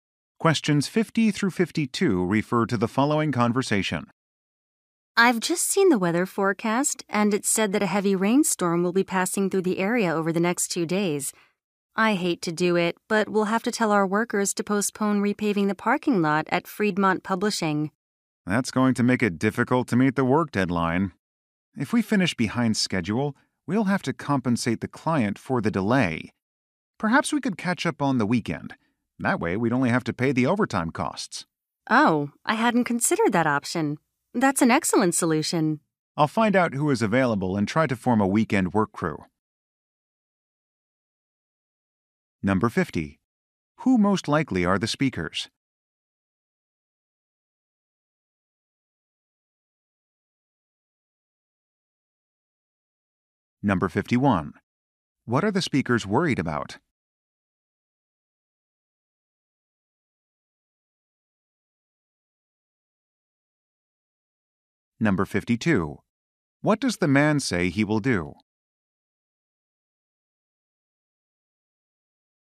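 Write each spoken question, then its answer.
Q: Who most likely are the speakers?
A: Paving contractors

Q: What are the speakers worried about?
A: Missing the work deadline

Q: What does the man say he will do?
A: Put together a weekend work crew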